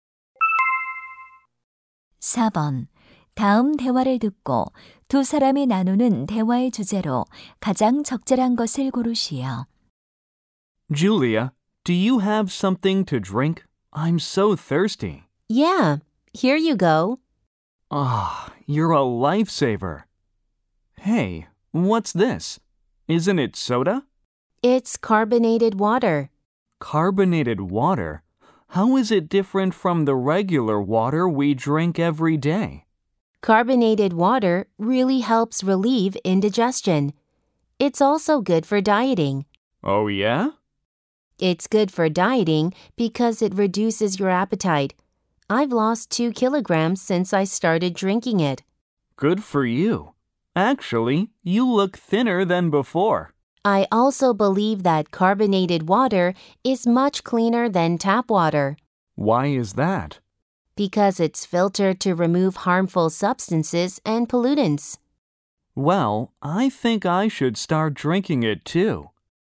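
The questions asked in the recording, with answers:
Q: 다음 대화를 듣고 두 사람이 나누는 대화의 주제로 가장 적절한 것을 고르시오.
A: 탄산수의 이점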